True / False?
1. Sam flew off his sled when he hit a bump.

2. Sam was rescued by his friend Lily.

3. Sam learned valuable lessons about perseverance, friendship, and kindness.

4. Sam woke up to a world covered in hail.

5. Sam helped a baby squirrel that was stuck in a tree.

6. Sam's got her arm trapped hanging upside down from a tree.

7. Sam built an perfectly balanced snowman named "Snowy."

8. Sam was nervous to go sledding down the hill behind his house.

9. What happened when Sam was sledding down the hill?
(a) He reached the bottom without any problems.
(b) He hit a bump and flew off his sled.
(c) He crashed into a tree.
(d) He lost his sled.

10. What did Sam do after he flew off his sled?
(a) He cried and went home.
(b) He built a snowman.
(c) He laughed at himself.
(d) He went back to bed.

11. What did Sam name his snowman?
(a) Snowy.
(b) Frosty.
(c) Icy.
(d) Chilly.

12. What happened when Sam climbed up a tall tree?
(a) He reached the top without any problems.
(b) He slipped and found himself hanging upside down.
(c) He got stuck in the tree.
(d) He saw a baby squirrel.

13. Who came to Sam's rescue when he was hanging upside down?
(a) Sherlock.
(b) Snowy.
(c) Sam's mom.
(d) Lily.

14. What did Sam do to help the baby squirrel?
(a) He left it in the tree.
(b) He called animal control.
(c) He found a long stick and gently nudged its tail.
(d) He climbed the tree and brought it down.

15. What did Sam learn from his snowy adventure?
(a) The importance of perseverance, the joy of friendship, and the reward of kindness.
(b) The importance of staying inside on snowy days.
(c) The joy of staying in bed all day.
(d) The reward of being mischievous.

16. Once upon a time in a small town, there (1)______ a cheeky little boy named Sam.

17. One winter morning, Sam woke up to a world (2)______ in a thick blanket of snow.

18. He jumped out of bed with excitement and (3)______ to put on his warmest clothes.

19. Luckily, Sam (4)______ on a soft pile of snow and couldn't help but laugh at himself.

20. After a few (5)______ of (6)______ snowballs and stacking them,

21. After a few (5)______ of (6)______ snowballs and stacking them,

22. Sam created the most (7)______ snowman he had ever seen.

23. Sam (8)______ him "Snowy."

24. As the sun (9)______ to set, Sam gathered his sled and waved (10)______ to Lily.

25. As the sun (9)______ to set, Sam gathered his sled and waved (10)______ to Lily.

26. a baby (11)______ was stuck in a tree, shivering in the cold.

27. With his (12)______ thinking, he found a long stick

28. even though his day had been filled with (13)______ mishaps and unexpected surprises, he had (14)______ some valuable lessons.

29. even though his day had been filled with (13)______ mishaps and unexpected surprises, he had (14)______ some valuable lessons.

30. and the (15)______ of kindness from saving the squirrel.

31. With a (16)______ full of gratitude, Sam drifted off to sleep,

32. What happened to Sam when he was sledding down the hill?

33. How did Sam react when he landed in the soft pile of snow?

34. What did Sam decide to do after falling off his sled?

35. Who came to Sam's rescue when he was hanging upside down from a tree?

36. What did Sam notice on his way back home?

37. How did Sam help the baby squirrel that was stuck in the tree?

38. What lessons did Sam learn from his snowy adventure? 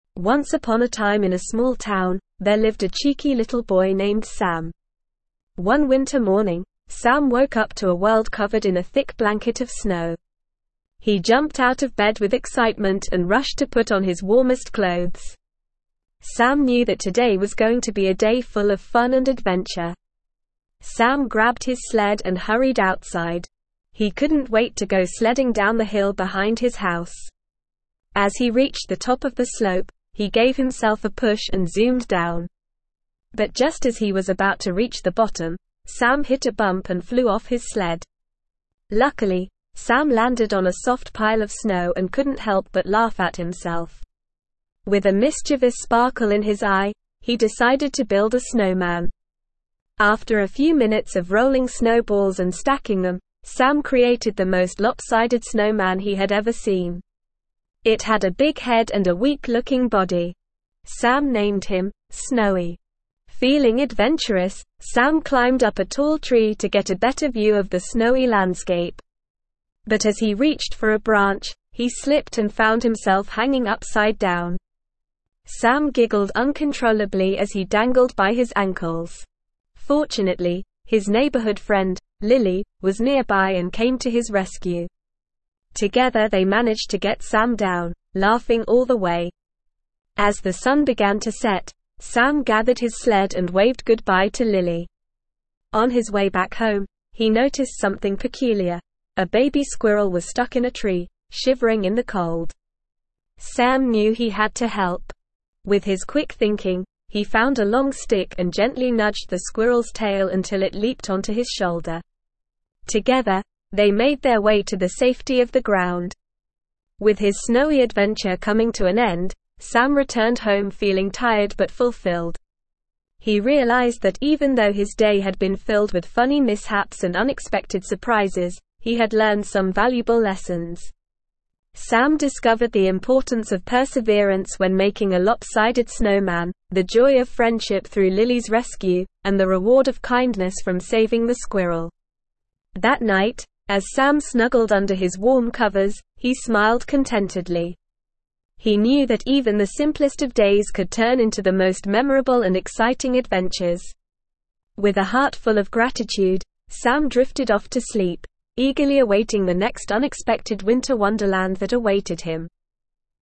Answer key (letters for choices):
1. True
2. True
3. True
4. False
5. True
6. False
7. False
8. False
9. b
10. c
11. a
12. b
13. d
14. c
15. a
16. lived
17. covered
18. rushed
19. landed
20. minutes
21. rolling
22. lopsided
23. named
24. began
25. goodbye
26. squirrel
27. quick
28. funny
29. learned
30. reward
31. heart
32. Sam hit a bump and flew off his sled.
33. Sam laughed at himself when he landed in the soft pile of snow.
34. Sam decided to build a snowman.
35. Lily, Sam's neighborhood friend, came to his rescue.
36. Sam noticed a baby squirrel stuck in a tree.
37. Sam used a long stick to gently nudge the squirrel's tail, helping it leap onto his shoulder.
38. Sam learned the importance of perseverance, the joy of friendship, and the reward of kindness.

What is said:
Once upon a time in a small town, there lived a cheeky little boy named Sam. One winter morning, Sam woke up to a world covered in a thick blanket of snow. He jumped out of bed with excitement and rushed to put on his warmest clothes. Sam knew that today was going to be a day full of fun and adventure.
Sam grabbed his sled and hurried outside. He couldn't wait to go sledding down the hill behind his house. As he reached the top of the slope, he gave himself a push and zoomed down. But just as he was about to reach the bottom, Sam hit a bump and flew off his sled!
Luckily, Sam landed on a soft pile of snow and couldn't help but laugh at himself. With a mischievous sparkle in his eye, he decided to build a snowman. After a few minutes of rolling snowballs and stacking them, Sam created the most lopsided snowman he had ever seen. It had a big head and a weak-looking body. Sam named him "Snowy."
Feeling adventurous, Sam climbed up a tall tree to get a better view of the snowy landscape. But as he reached for a branch, he slipped and found himself hanging upside down! Sam giggled uncontrollably as he dangled by his ankles. Fortunately, his neighborhood friend, Lily, was nearby and came to his rescue. Together they managed to get Sam down, laughing all the way.
As the sun began to set, Sam gathered his sled and waved goodbye to Lily. On his way back home, he noticed something peculiar – a baby squirrel was stuck in a tree, shivering in the cold. Sam knew he had to help. With his quick thinking, he found a long stick and gently nudged the squirrel's tail until it leaped onto his shoulder. Together, they made their way to the safety of the ground.
With his snowy adventure coming to an end, Sam returned home feeling tired but fulfilled. He realized that even though his day had been filled with funny mishaps and unexpected surprises, he had learned some valuable lessons. Sam discovered the importance of perseverance when making a lopsided snowman, the joy of friendship through Lily's rescue, and the reward of kindness from saving the squirrel.
That night, as Sam snuggled under his warm covers, he smiled contentedly. He knew that even the simplest of days could turn into the most memorable and exciting adventures. With a heart full of gratitude, Sam drifted off to sleep, eagerly awaiting the next unexpected winter wonderland that awaited him.

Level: Level 4